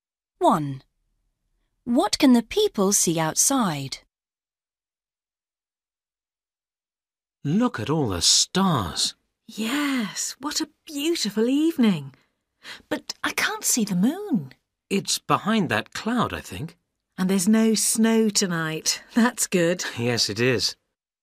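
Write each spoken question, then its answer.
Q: What can the people see outside?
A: The stars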